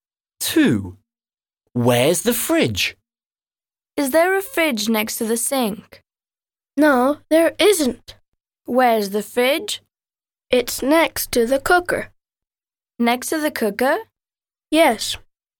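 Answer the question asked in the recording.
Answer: Next to the cooker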